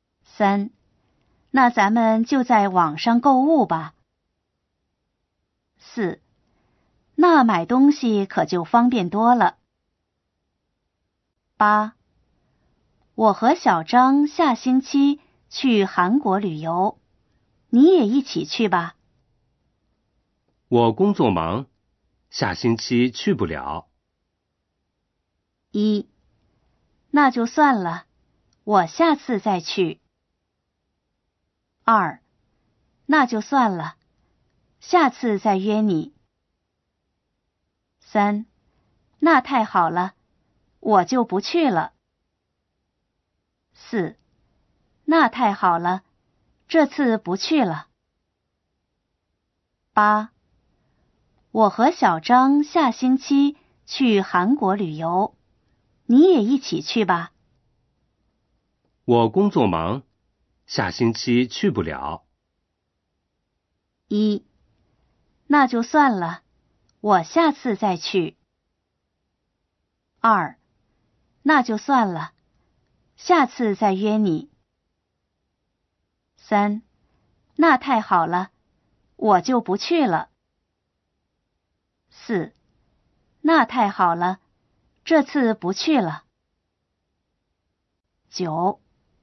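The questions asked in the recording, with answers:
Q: 我工作忙,下星期去不了。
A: 二: 那就算了,下次再约你。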